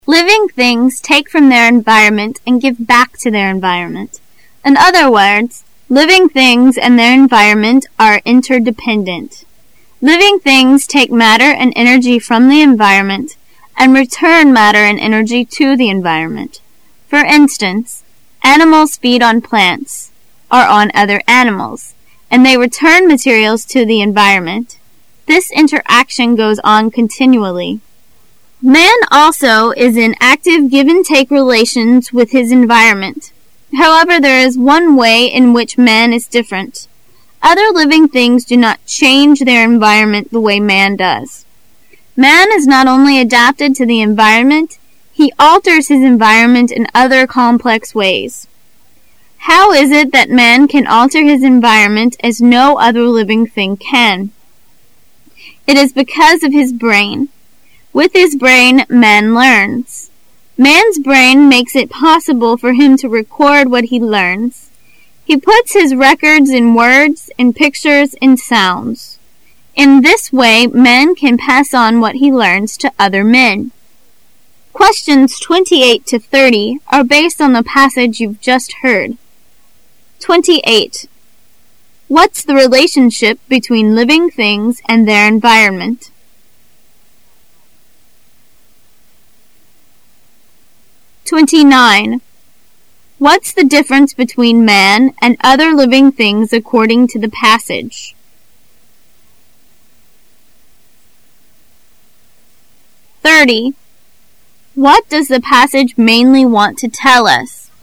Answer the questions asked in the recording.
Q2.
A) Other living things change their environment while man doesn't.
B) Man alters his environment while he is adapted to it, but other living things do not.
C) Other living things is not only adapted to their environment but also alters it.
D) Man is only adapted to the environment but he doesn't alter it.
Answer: B) Man alters his environment while he is adapted to it, but other living things do not.
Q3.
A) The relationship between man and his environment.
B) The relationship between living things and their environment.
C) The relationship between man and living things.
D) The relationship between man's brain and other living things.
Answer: A) The relationship between man and his environment.

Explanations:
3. What does the passage mainly want to tell us? [试题分析]本题考查综合概括能力。 [关键词语]Man also is in active give-and-take relations with his environment. [详细解答]可以听出讲living things与其environment的关系为的是引出人与其环境的关系,后面可听到:Man also is in active give-and-take relations with his environment.它是主题句,又是承上启下的句子。故选A。

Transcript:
[解析] 28-30 Living things take from their environment and give back to their environment. In other words, living things and their environment are interdependent. Living things take matter and energy from the environment, and return matter and energy to the environment. For instance, animals feed on plants or on other animals.And they return materials to the environment. This interaction goes on continually. Man also is in active give-and-take relations with his environment. However, there is one way in which man is different. Other living things do not change their environ ment the way man does. Man is not only adapted to the environment. He alters his environment in other complex ways. How it is that man can alter his environment, as no other living thing can? It is because of his brain. With his brain, man learns. Man's brain makes it possible for him to record what he learns. He puts his records in words, in pictures, in sounds. In this way man can pass on what he learns to other men. What's the relationship between living things and their environment?